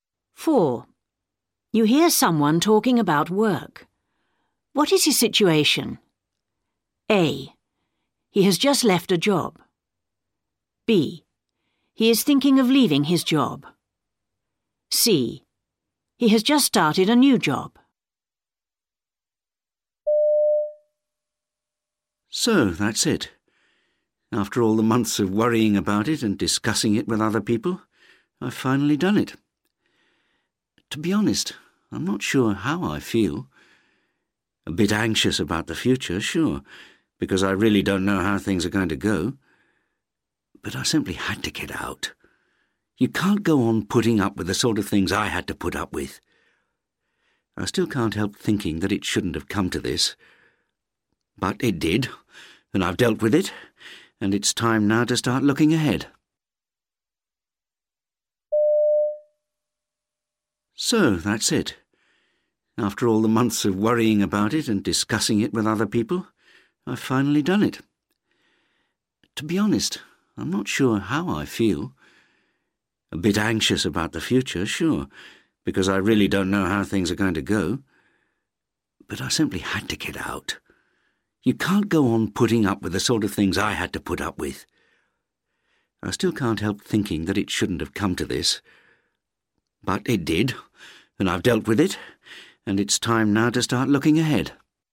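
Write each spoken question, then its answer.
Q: What is his situation?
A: A: He has just left a job.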